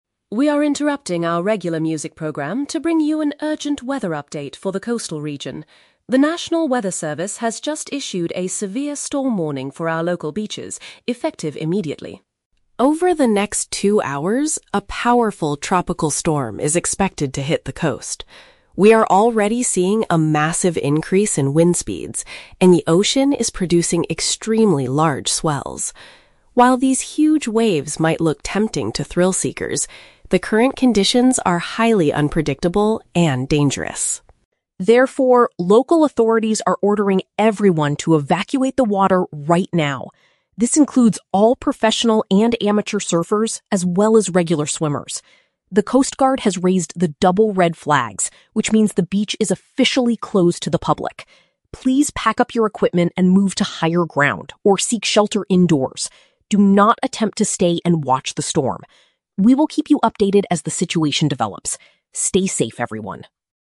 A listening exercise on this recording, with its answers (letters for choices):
Listen to the radio broadcast about the local weather. Choose the correct answer (A, B, or C) for each question.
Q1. What is the main purpose of this radio announcement?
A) To advertise a new music show on the local station.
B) To alert people about dangerous ocean conditions.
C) To report the results of a professional surfing event.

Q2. How does the broadcaster describe the current state of the ocean?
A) The waves are exceptionally big and unsafe.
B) The water is perfectly calm for beginner surfers.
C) The waves are becoming smaller as the wind drops.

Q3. What are the listeners instructed to do?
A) To stand far back on the sand and observe the weather.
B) To call the local coast guard for an emergency rescue.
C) To leave the area and find a secure place inside a building.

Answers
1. B
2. A
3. C

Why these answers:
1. The broadcaster says this is an "urgent weather update" and a "severe storm warning." This means the purpose is to alert people about dangerous conditions. Why the traps are wrong: Option A is a trap; the audio mentions a "regular music program," but they are interrupting it, not advertising a new one. Option C is a trap; the word "professional" is used for surfers in the water, but there is no competition happening.
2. The broadcaster mentions the ocean is producing "extremely large swells" (waves) and that conditions are "highly unpredictable and dangerous." "Exceptionally big and unsafe" is a perfect paraphrase of this. Why the traps are wrong: Option B is the exact opposite of the truth. Option C is also the opposite, as the audio says there is a "massive increase in wind speeds."
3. The broadcaster tells everyone to "evacuate the water," "move to higher ground," and "seek shelter indoors." "Leave the area" matches evacuating, and finding a "secure place inside a building" matches seeking shelter indoors. Why the traps are wrong: Option A is a trap; the broadcaster explicitly warns: "Do not attempt to stay and watch the storm." Option B is a trap; the "coast guard" is mentioned because they raised the red flags, but listeners are not told to call them.

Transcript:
Broadcaster: We are interrupting our regular music program to bring you an urgent weather update for the coastal region. The national weather service has just issued a severe storm warning for our local beaches, effective immediately.
Over the next two hours, a powerful tropical storm is expected to hit the coast. We are already seeing a massive increase in wind speeds, and the ocean is producing extremely large swells. While these huge waves might look tempting to thrill-seekers, the current conditions are highly unpredictable and dangerous.
Therefore, local authorities are ordering everyone to evacuate the water right now. This includes all professional and amateur surfers, as well as regular swimmers. The coast guard has raised the double red flags, which means the beach is officially closed to the public. Please pack up your equipment and move to higher ground or seek shelter indoors. Do not attempt to stay and watch the storm. We will keep you updated as the situation develops. Stay safe, everyone.